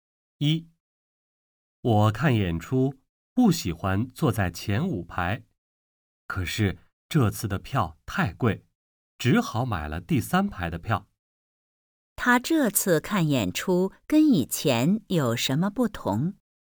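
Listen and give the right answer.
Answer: 这次坐在第三排(以前不坐前五排)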